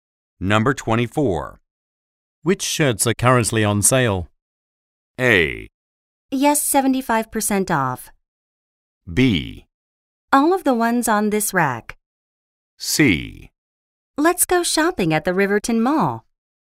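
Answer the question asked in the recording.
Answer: B: All of the ones on this rack.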